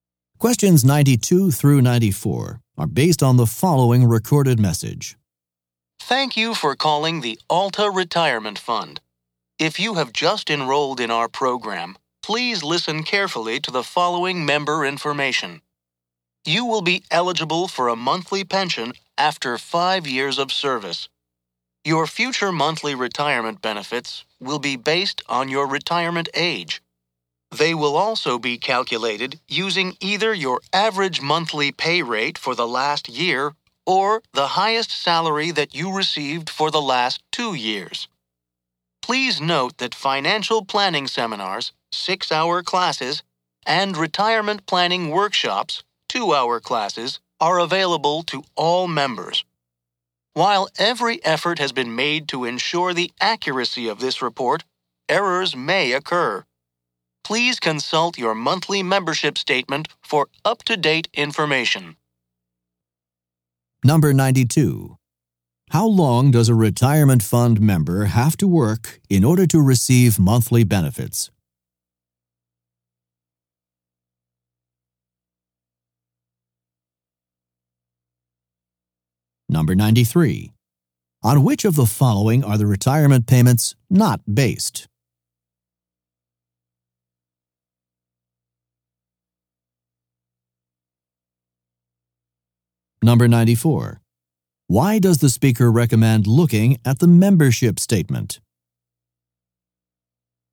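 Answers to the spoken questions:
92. 5 years
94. For up-to-date information, because the message may contain errors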